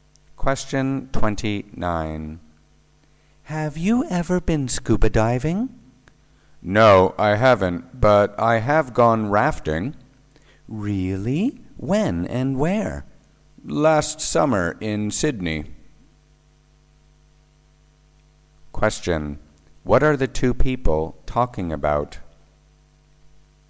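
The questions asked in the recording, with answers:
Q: What are the two people talking about?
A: Water sports they have tried (scuba diving and rafting)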